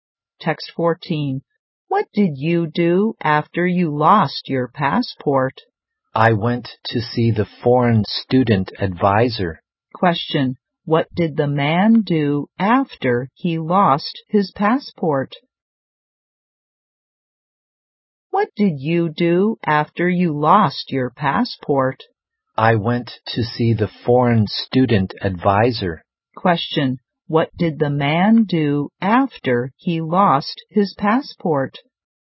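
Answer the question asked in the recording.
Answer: He went to see the foreign student advisor.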